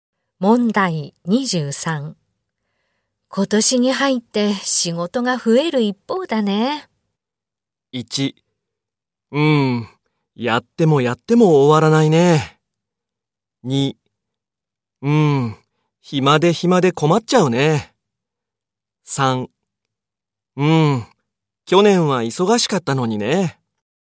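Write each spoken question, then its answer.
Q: 今年に入って仕事が増える一方だね。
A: 1: やってもやっても終わらないね。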